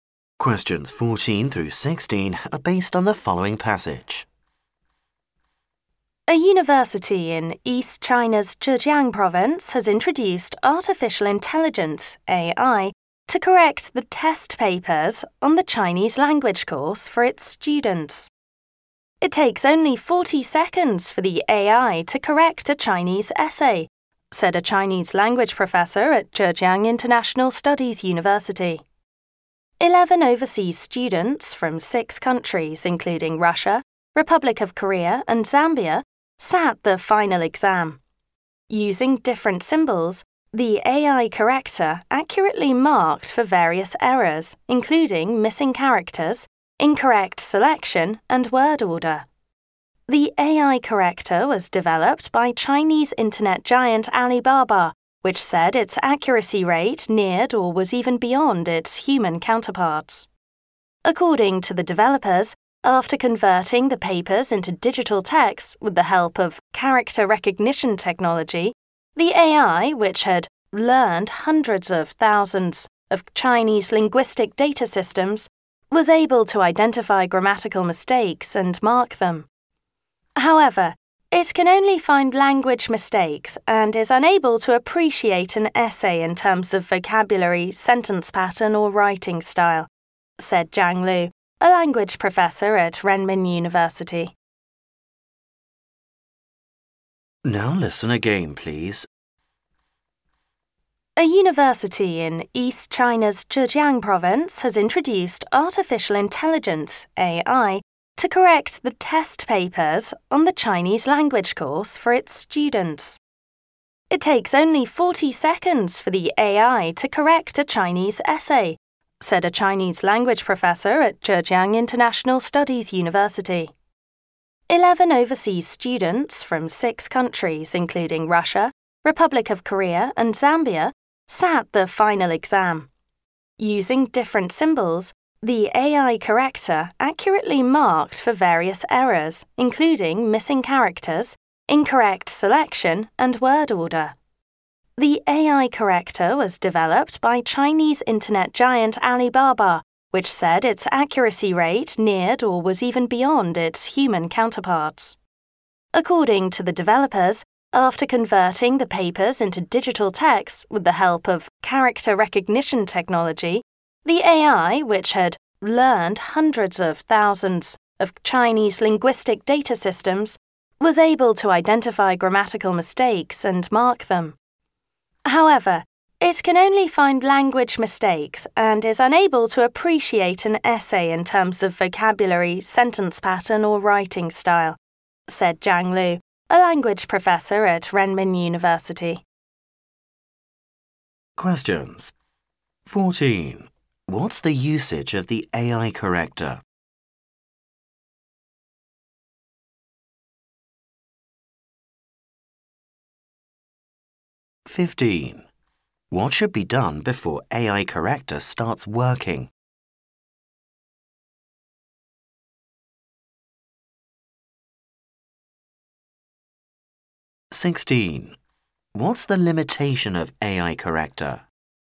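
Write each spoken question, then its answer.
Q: What's the usage of the AI corrector?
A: To correct Chinese language test papers and essays

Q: What should be done before AI corrector starts working?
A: The papers must be converted into digital text

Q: What's the limitation of AI corrector?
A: It cannot judge an essay's vocabulary, sentence patterns or writing style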